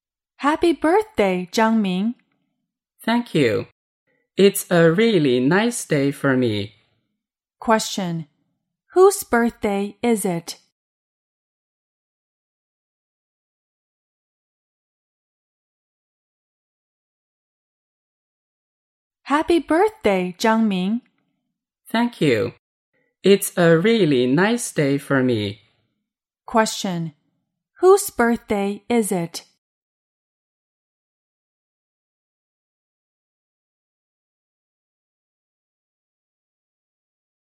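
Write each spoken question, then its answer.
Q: Whose birthday is it?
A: Zhang Ming's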